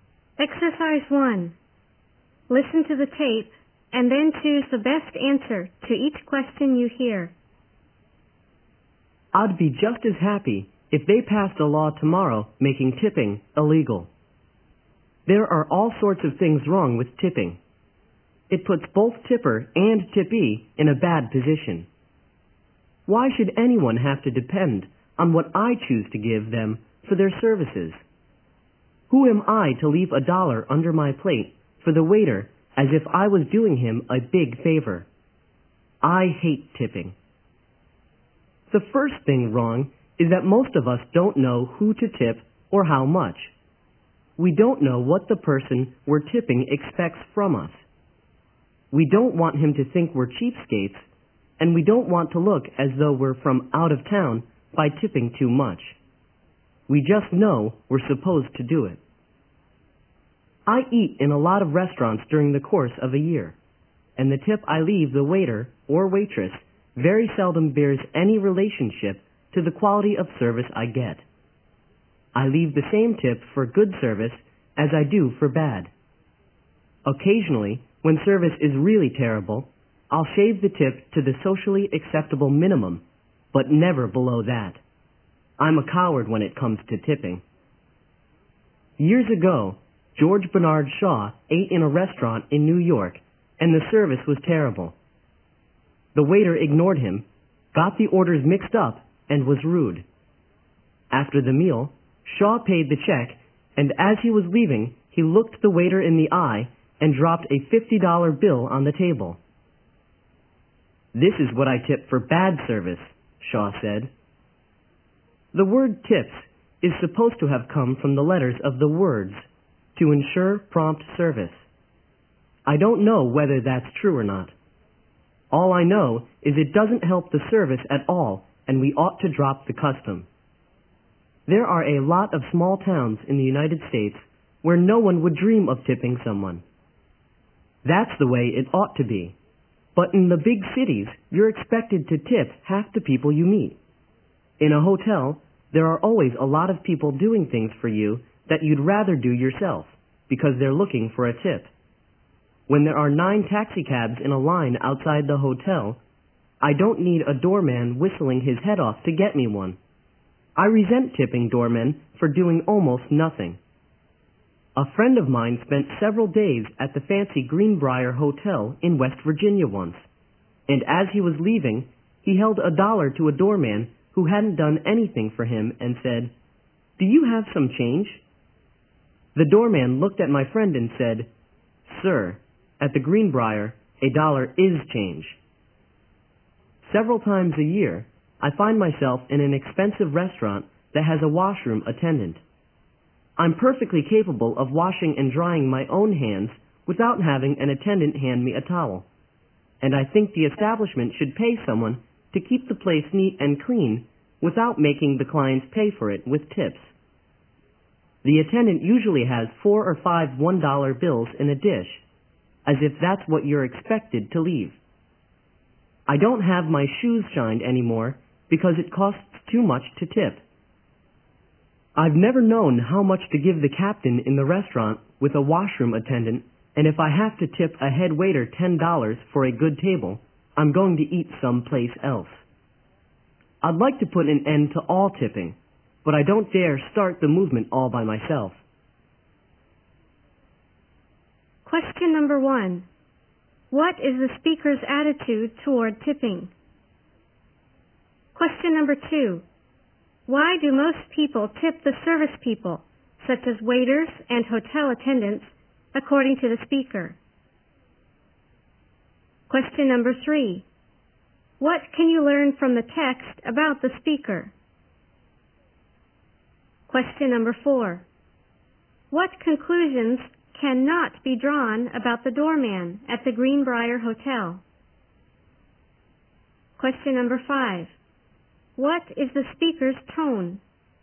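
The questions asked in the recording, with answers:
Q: What is the speaker's attitude toward tipping?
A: He dislikes it and would like it abolished

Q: Why do most people tip the service people, such as waiters and hotel attendants, according to the speaker?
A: Because they know they're supposed to do it and don't want to look cheap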